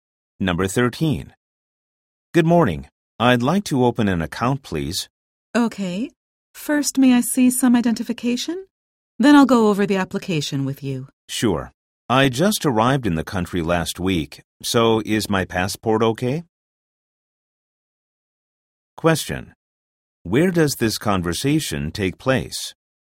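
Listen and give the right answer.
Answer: At a bank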